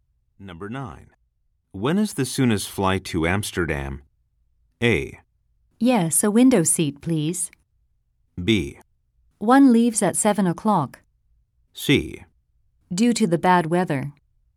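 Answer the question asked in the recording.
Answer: B: One leaves at 7 o'clock.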